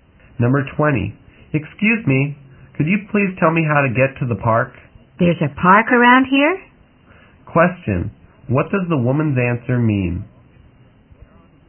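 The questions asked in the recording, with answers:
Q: Question, what does the woman's answer mean?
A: She doesn't know of any park nearby.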